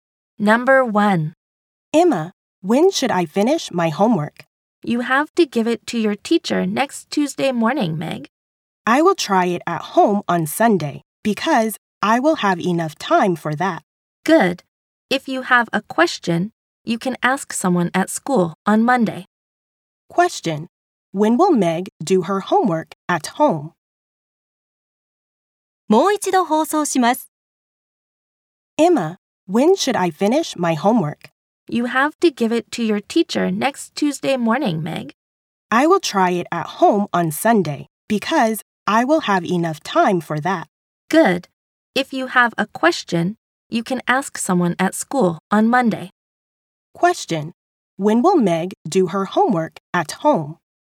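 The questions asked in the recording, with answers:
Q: When will Meg do her homework at home?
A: On Sunday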